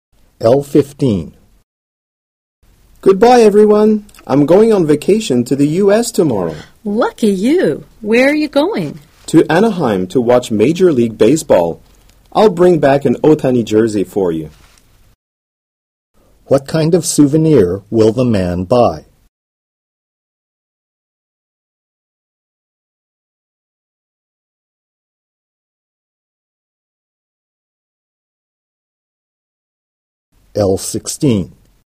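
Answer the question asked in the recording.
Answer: An Otani jersey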